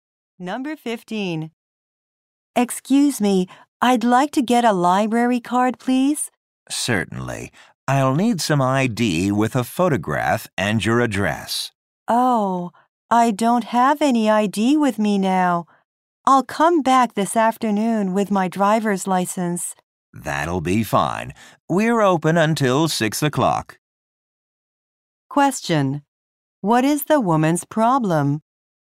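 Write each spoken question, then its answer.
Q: What is the woman's problem?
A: She doesn't have any ID with her.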